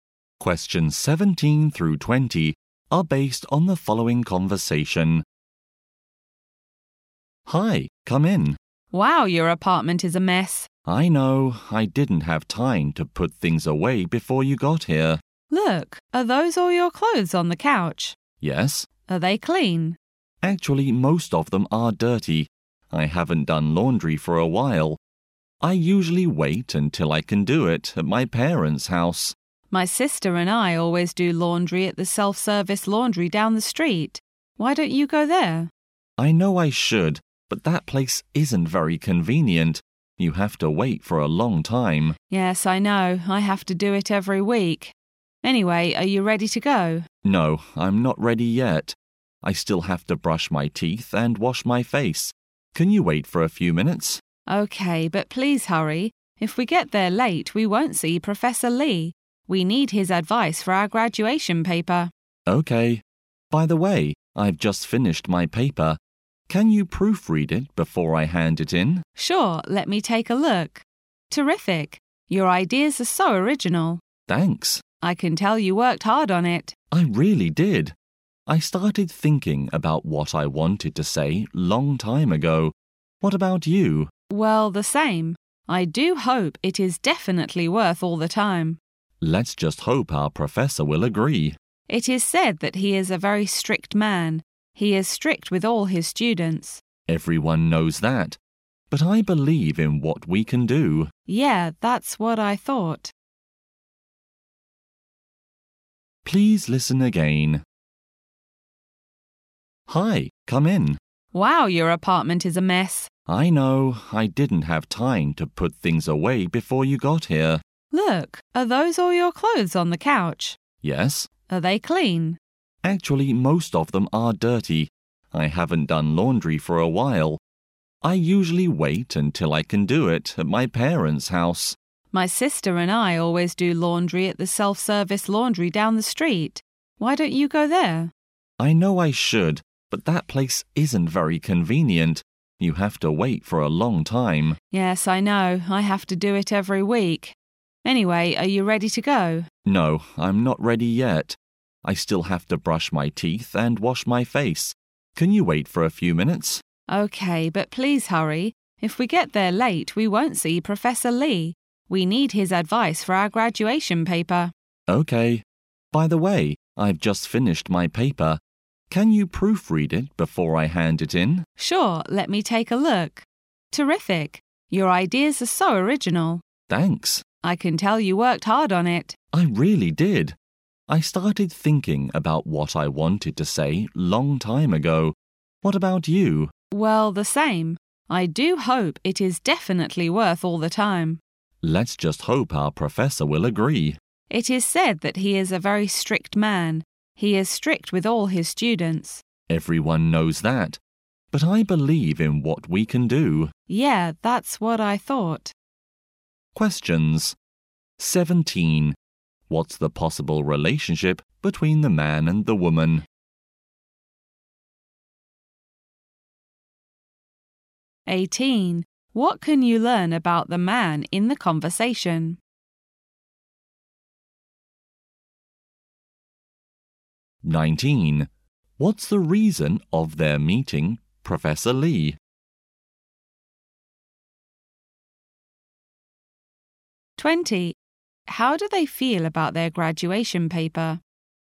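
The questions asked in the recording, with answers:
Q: What's the possible relationship between the man and the woman?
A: Classmates

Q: What's the reason of their meeting, Professor Lee?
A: To get his advice on their graduation paper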